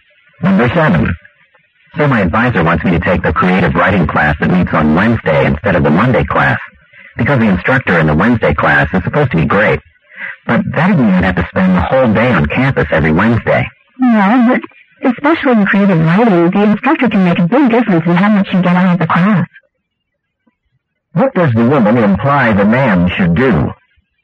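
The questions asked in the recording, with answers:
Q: What does the woman imply the man should do?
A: Take the Wednesday class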